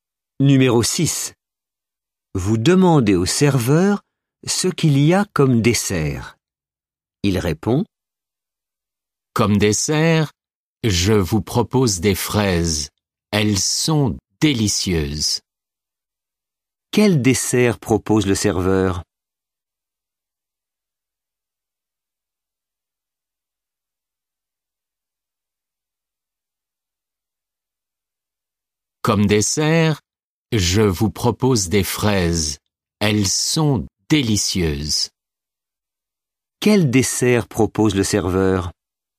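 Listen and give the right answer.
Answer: des fraises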